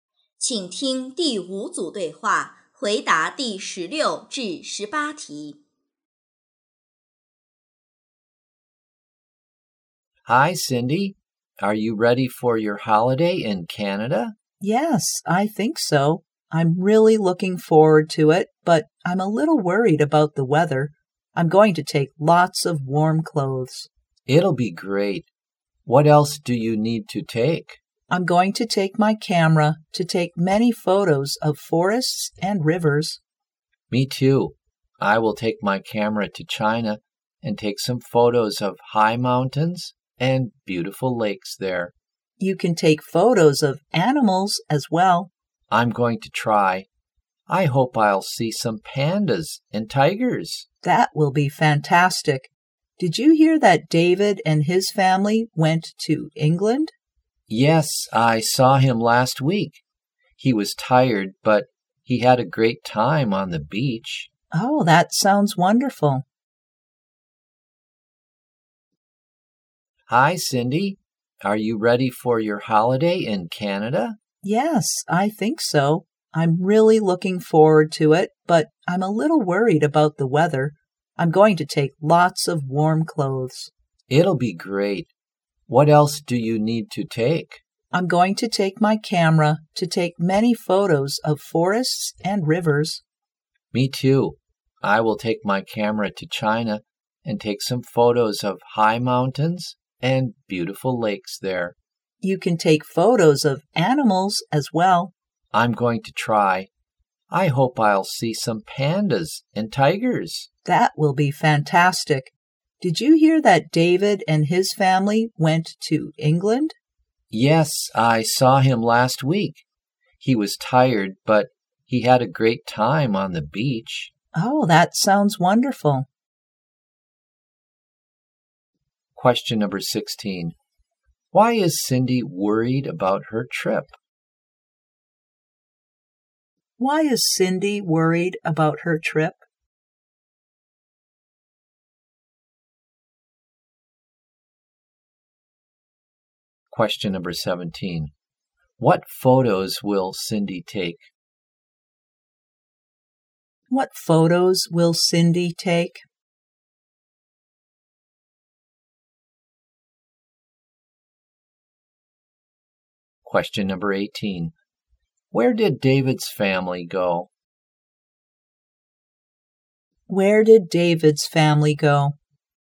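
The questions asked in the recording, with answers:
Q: Why is Cindy worried about her trip?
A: Because of the weather

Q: What photos will Cindy take?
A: Photos of forests and rivers

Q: Where did David's family go?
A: England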